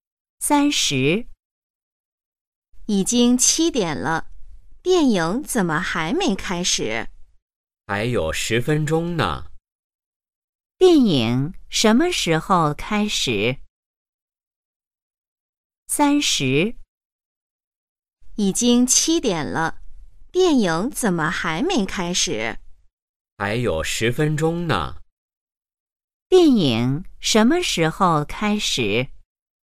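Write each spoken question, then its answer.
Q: 电影什么时候开始?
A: 7点10分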